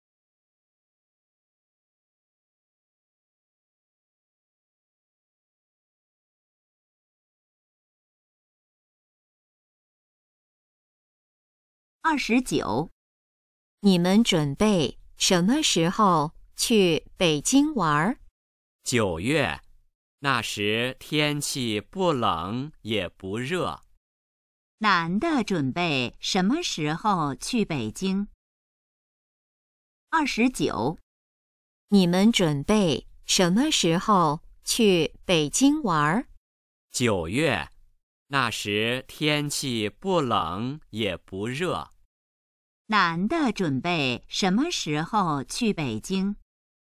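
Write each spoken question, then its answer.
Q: 男的准备什么时候去北京?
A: 9月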